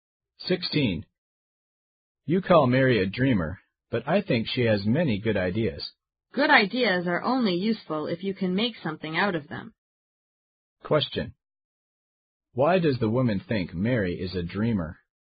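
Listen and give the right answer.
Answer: Her ideas are not practical; nothing is made of them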